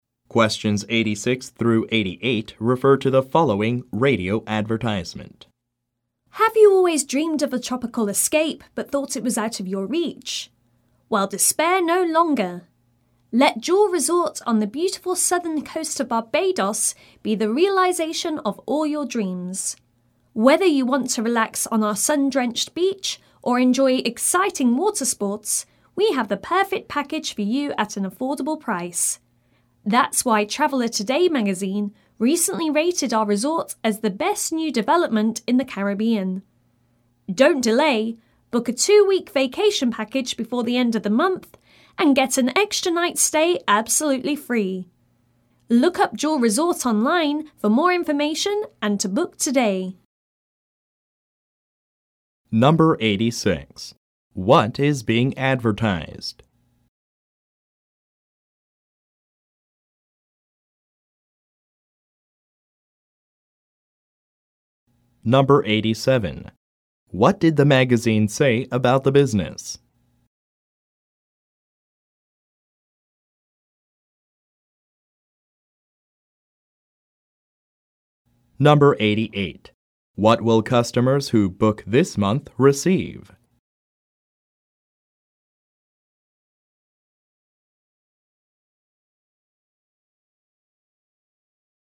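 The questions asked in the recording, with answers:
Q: What is being advertised?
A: A tropical resort (Jewel Resort in Barbados)

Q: What did the magazine say about the business?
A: It is the best new development in the Caribbean

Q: What will customers who book this month receive?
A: An extra night's stay free (with a 2-week package)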